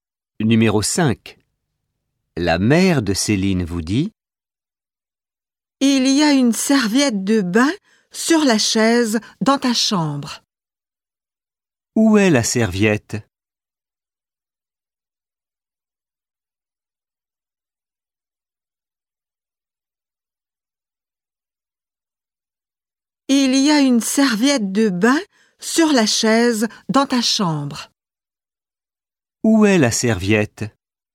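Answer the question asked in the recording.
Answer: Sur la chaise dans votre chambre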